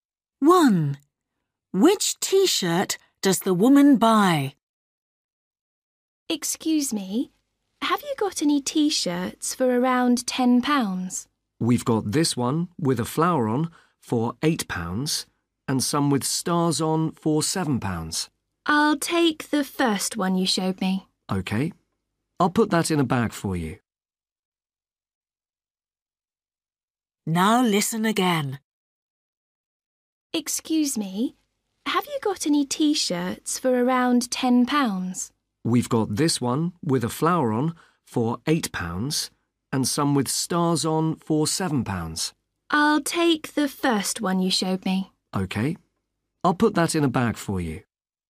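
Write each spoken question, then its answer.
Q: Which T-shirt does the woman buy?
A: The one with a flower on, for £8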